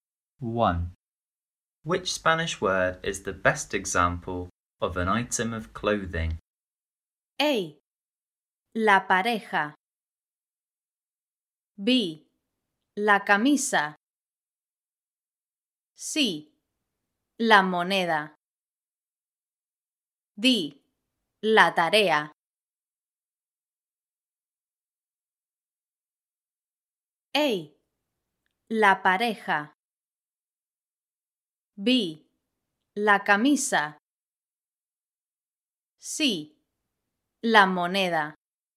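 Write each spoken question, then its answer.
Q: Which Spanish word is the best example of an item of clothing?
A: B: La camisa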